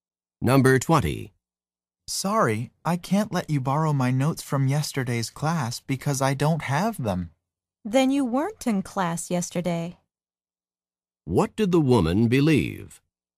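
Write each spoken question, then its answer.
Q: What did the woman believe?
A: That the man had been in class yesterday.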